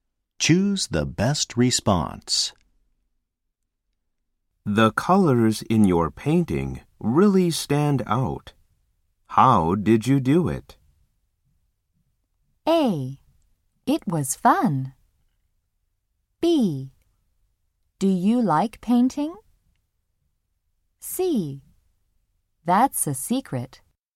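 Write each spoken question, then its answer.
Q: The colors in your painting really stand out. How did you do it?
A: C: That's a secret.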